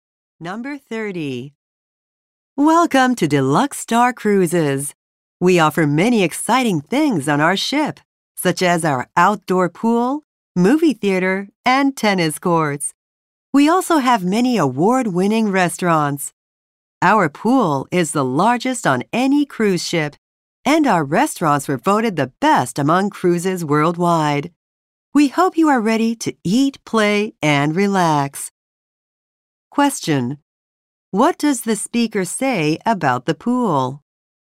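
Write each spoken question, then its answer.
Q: What does the speaker say about the pool?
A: It is the largest on any cruise ship.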